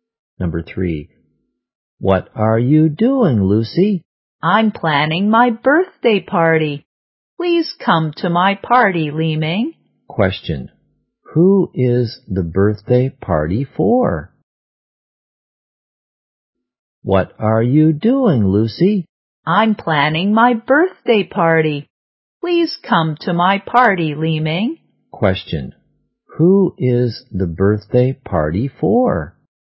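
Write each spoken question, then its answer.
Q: Question. Who is the birthday party for?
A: Lucy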